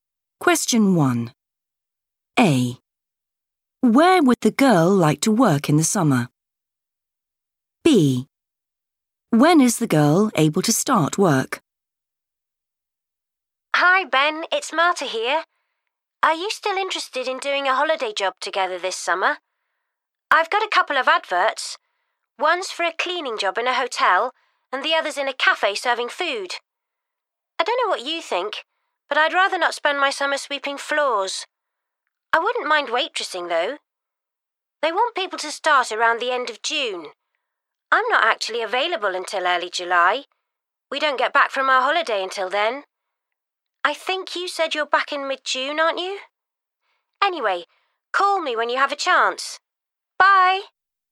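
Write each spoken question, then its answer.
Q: Where would the girl like to work in the summer?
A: in a cafe

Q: When is the girl able to start work?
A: early July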